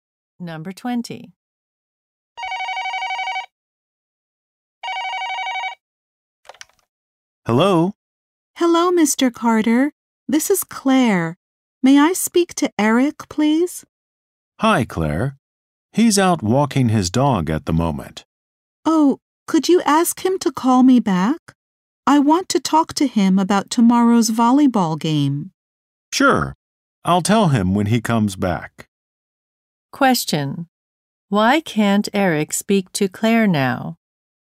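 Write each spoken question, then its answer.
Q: Why can't Eric speak to Claire now?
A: He is out walking his dog.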